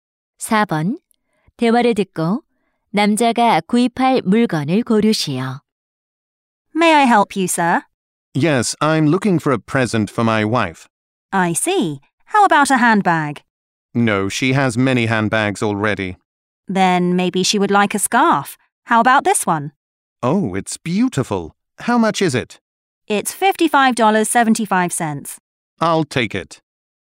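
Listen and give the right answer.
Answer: 스카프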